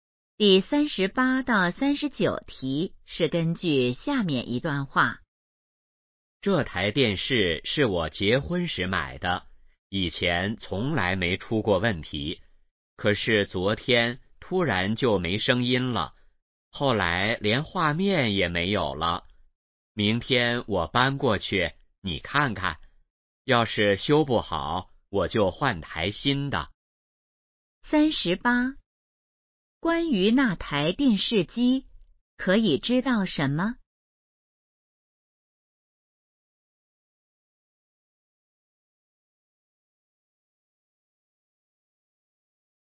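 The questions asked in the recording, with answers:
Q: 关于那台电视机,可以知道什么?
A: 是结婚时买的,突然没声音、没画面了

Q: 说话人打算怎么做?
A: 先修,修不好就换台新的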